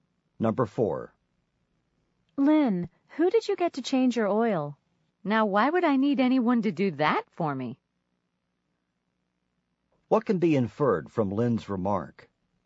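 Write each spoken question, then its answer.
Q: What can be inferred from Lynn's remark?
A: Lynn changed her oil herself.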